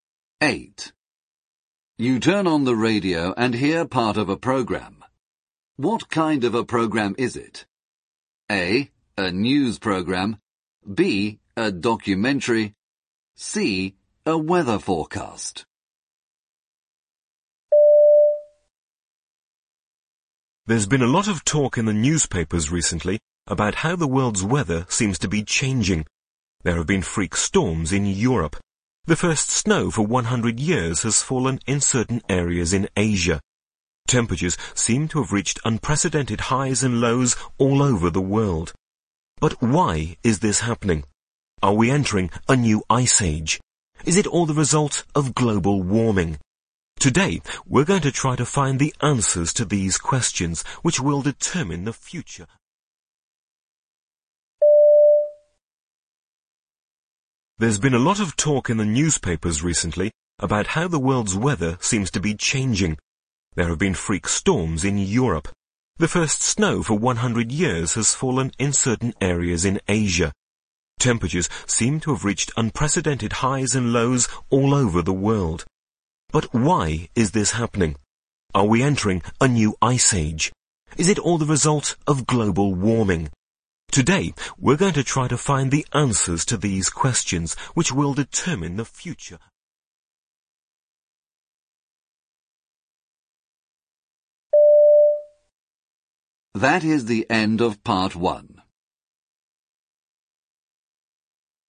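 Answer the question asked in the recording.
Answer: B: A documentary.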